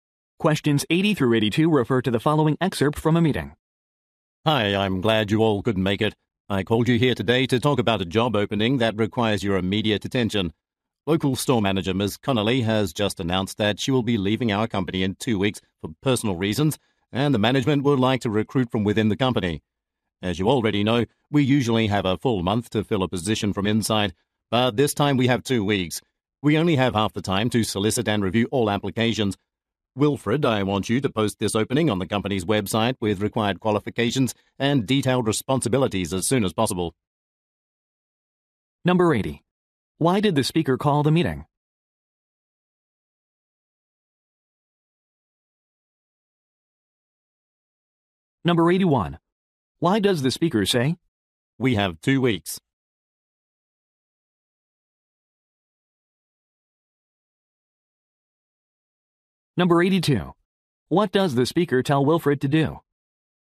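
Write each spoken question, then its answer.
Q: Why did the speaker call the meeting?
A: To discuss a job opening

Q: What does the speaker tell Wilfred to do?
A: Post the job opening on the company website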